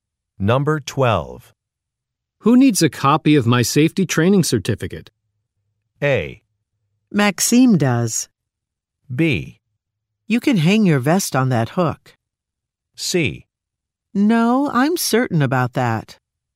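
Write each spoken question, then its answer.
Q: Who needs a copy of my safety training certificate?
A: A: Maxime does.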